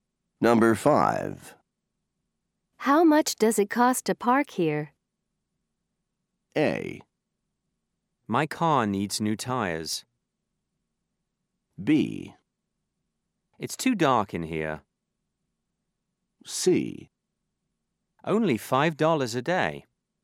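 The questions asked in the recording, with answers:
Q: How much does it cost to park here?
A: C: Only $5 a day.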